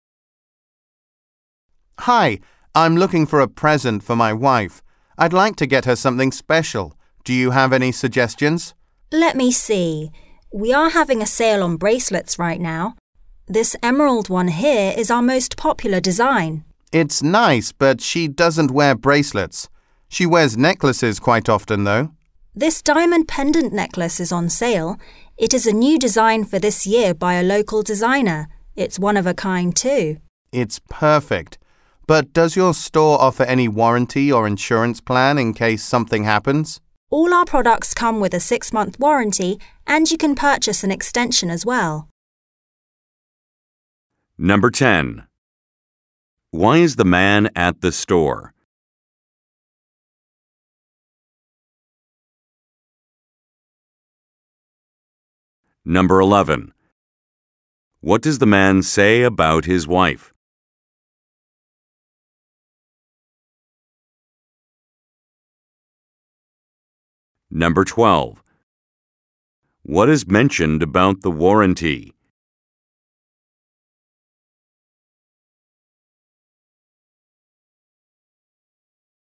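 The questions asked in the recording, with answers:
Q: Why is the man at the store?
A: To buy a present for his wife

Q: What does the man say about his wife?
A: She doesn't wear bracelets but often wears necklaces

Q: What is mentioned about the warranty?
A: All products have a 6-month warranty, and it can be extended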